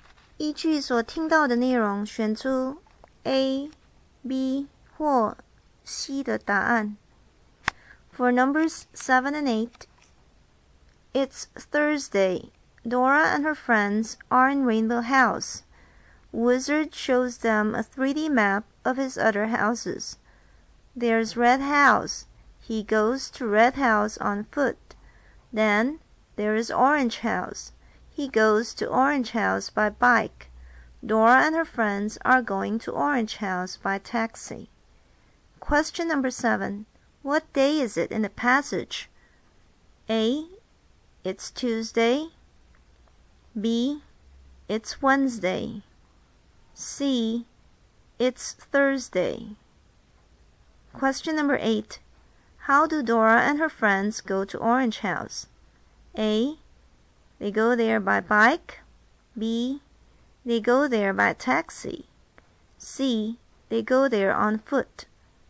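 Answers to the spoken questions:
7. C: It's Thursday.
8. B: They go there by taxi.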